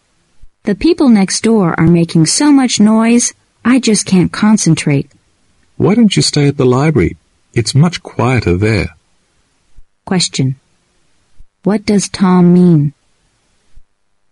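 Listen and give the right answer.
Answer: The speaker should go to the library, where it is quieter.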